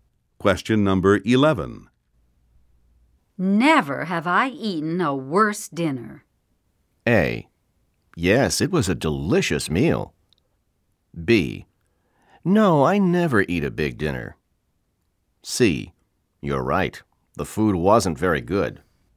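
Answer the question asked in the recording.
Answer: C: You're right. The food wasn't very good.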